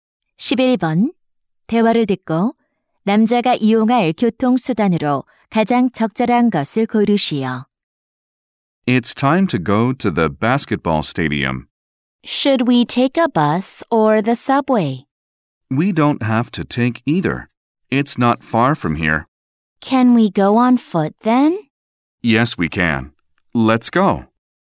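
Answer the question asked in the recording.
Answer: 도보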